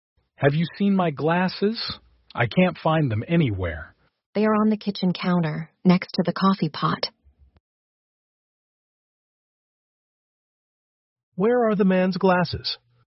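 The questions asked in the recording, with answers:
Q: Where are the man's glasses?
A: On the kitchen counter, next to the coffee pot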